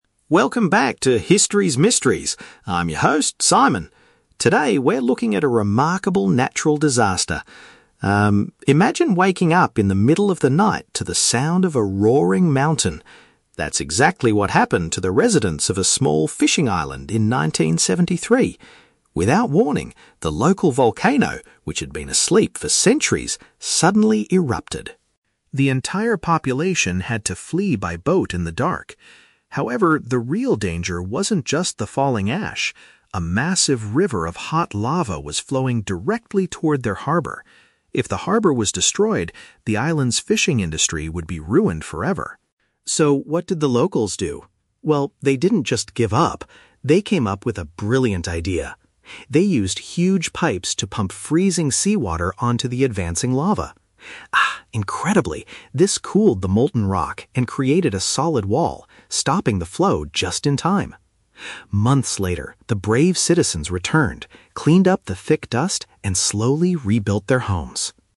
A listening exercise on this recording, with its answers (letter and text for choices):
Listen to a podcast host telling a historical story about a volcano and choose the correct answer (A, B, or C) for each question.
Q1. What was the biggest threat to the island's future economy?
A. The thick dust burying the local houses.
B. The molten rock destroying the shipping port.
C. The severe storms sinking all the fishing boats.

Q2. How did the people stop the disaster from completely ruining their town?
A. By spraying ocean water to cool the liquid stone.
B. By constructing a high wall made of rocks.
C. By calling for international military helicopters.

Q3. What happened after the emergency was over?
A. The residents relocated to a different country permanently.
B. The citizens came back and reconstructed their neighborhood.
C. The government decided to build a brand new harbor.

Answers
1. B. The molten rock destroying the shipping port.
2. A. By spraying ocean water to cool the liquid stone.
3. B. The citizens came back and reconstructed their neighborhood.

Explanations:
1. The host says, "A massive river of hot lava was flowing directly toward their harbor." If it was destroyed, the fishing industry would be ruined. "Molten rock" is a synonym for lava, and "shipping port" is a paraphrase of harbor.
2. The locals pumped "freezing seawater onto the advancing lava" which "cooled the molten rock". "Ocean water" is a paraphrase of seawater, and "liquid stone" means lava/molten rock.
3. The host says that months later, "the brave citizens returned... and slowly rebuilt their homes." "Came back" means returned, and "reconstructed their neighborhood" is a paraphrase of rebuilt their homes.

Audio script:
Simon: Welcome back to 'History's Mysteries'. I'm your host, Simon. Today, we're looking at a remarkable natural disaster. Um, imagine waking up in the middle of the night to the sound of a roaring mountain. That's exactly what happened to the residents of a small fishing island in 1973. Without warning, the local volcano, which had been asleep for centuries, suddenly erupted.
The entire population had to flee by boat in the dark. However, the real danger wasn't just the falling ash. A massive river of hot lava was flowing directly toward their harbor. If the harbor was destroyed, the island's fishing industry would be ruined forever.
So, what did the locals do? Well, they didn't just give up. They came up with a brilliant idea. They used huge pipes to pump freezing seawater onto the advancing lava. Ah, incredibly, this cooled the molten rock and created a solid wall, stopping the flow just in time. Months later, the brave citizens returned, cleaned up the thick dust, and slowly rebuilt their homes.